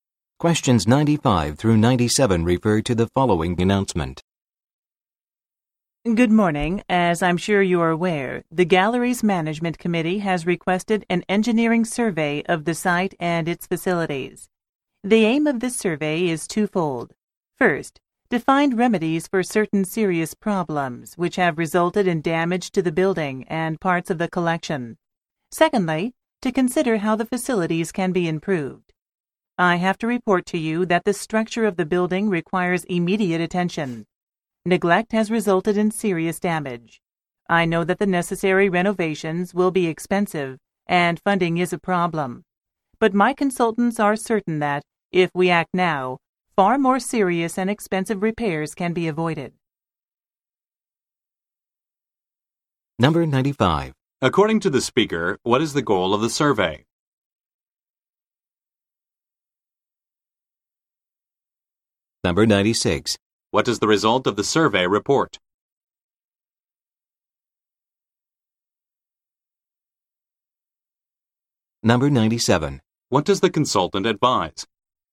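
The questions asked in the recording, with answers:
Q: According to the speaker, what is the goal of the survey?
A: To find remedies for the damage and consider how the facilities can be improved

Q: What does the result of the survey report?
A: The building's structure needs immediate attention because of serious damage

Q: What does the consultant advise?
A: Act now to avoid more serious and expensive repairs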